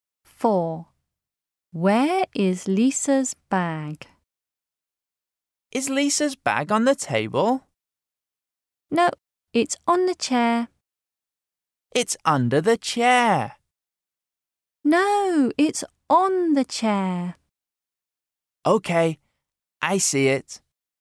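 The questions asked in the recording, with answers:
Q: Where is Lisa's bag?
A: On the chair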